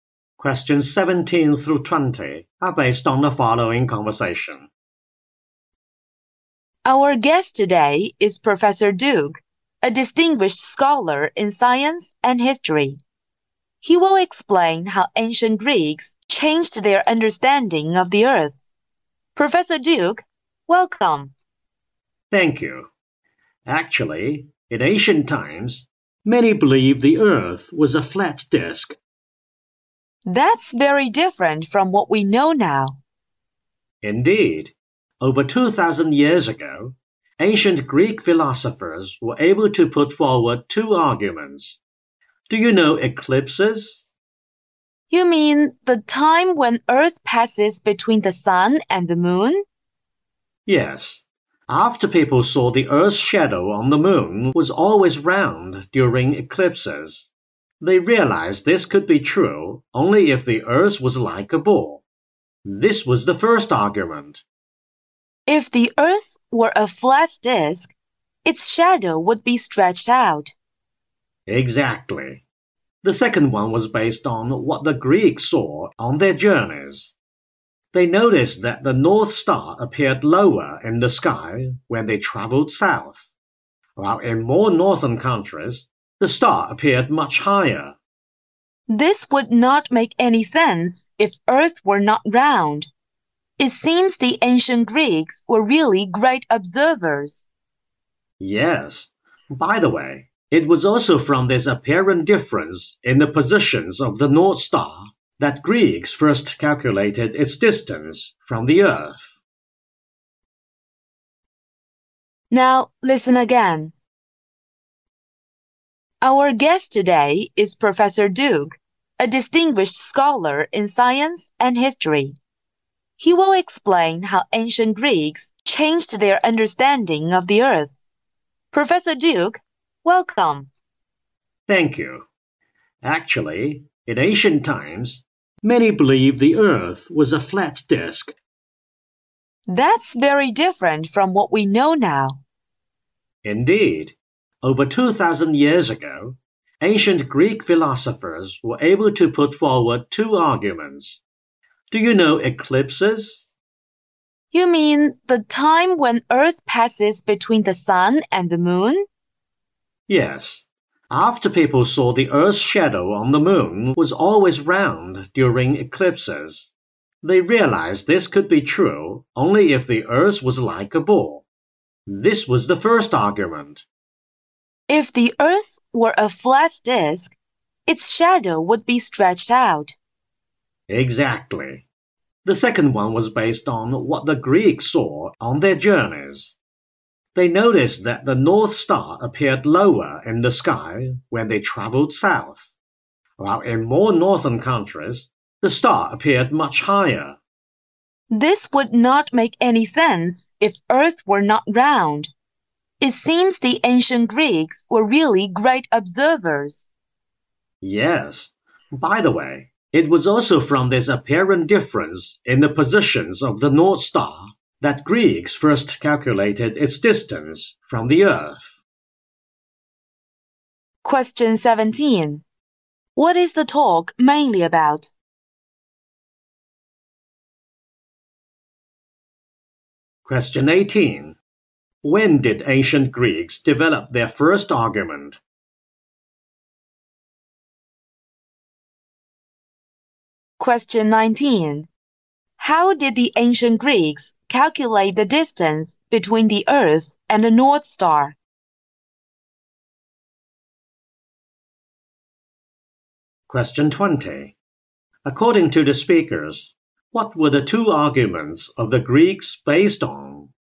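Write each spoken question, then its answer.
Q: What is the talk mainly about?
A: How ancient Greeks came to understand that the Earth is round

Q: When did ancient Greeks develop their first argument?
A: After they saw that the Earth's shadow on the moon was always round during eclipses

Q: How did the ancient Greeks calculate the distance between the Earth and the North Star?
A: From the difference in the North Star's position seen from different places

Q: According to the speakers, what were the two arguments of the Greeks based on?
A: Eclipses and what they saw on their journeys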